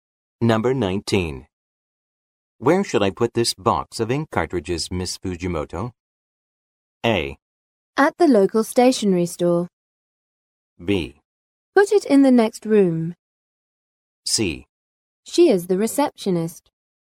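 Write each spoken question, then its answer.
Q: Where should I put this box of ink cartridges, Miss Fujimoto?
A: B: Put it in the next room.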